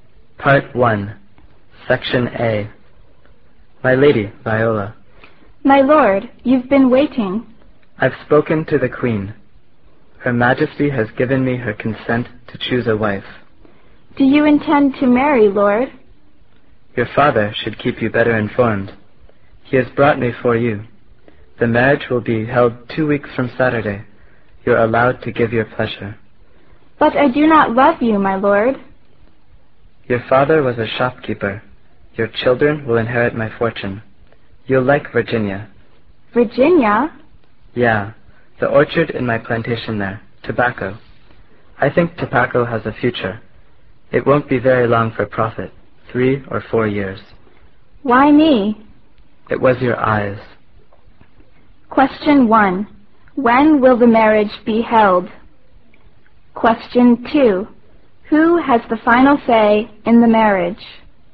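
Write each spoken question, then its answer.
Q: When will the marriage be held?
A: 2 weeks from Saturday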